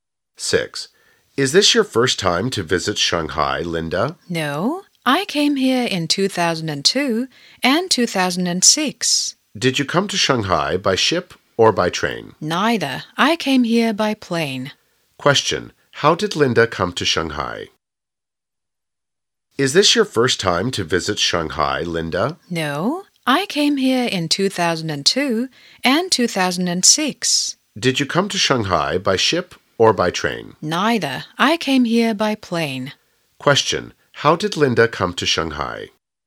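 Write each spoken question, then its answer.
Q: How did Linda come to Shanghai?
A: By plane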